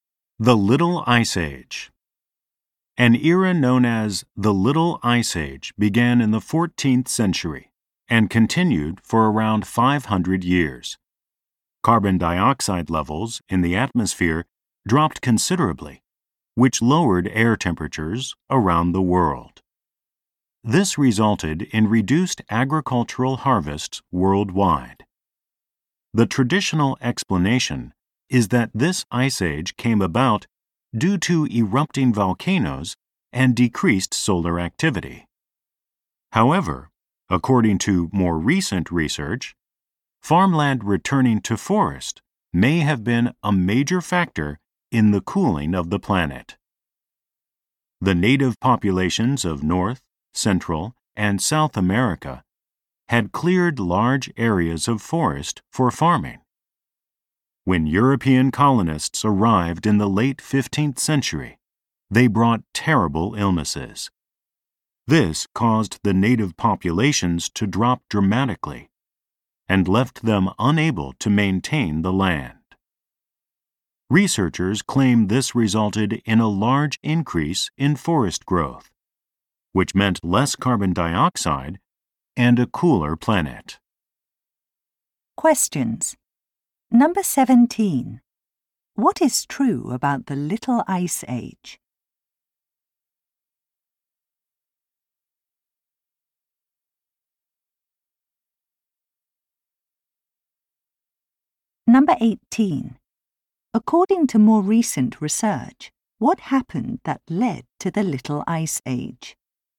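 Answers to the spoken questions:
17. It lowered temperatures and reduced harvests worldwide.
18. Farmland returned to forest after native populations declined from diseases brought by Europeans.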